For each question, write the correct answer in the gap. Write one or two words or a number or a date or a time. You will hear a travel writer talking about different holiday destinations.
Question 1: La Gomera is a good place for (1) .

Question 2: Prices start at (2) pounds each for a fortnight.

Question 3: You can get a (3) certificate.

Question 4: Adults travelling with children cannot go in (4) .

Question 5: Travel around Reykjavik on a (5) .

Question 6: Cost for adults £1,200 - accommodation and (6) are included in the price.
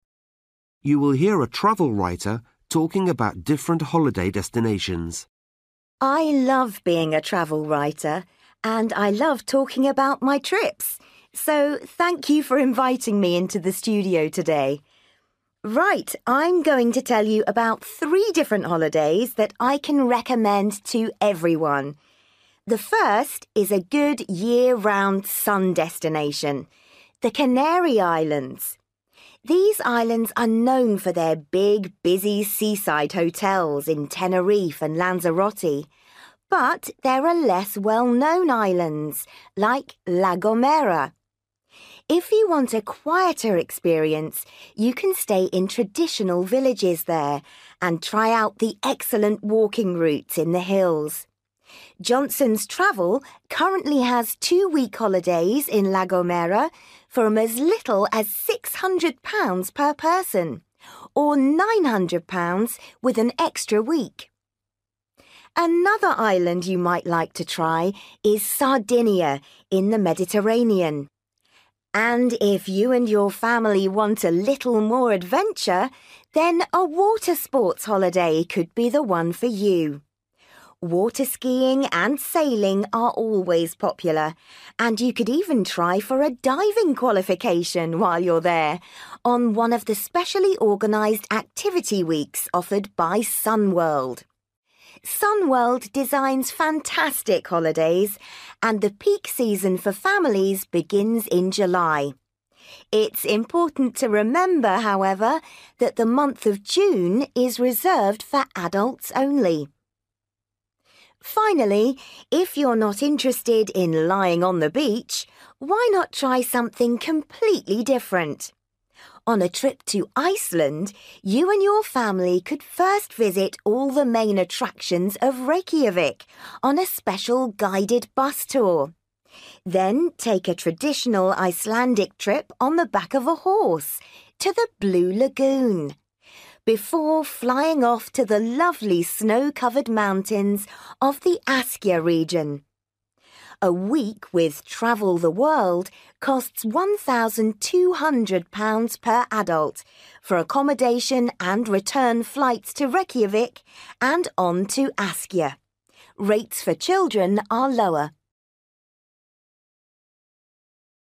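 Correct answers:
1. walking
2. 600
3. diving
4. June
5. bus tour
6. flights

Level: Luyện nghe trình độ B1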